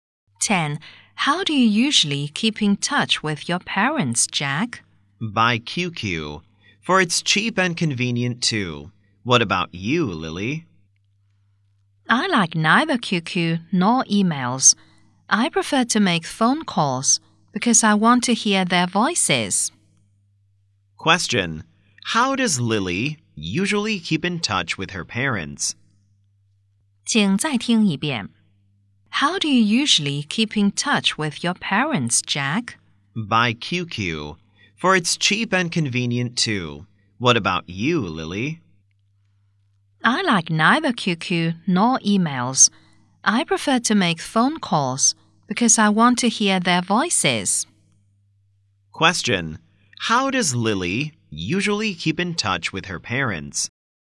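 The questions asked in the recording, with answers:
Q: Question. How does Lily usually keep in touch with her parents?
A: By making phone calls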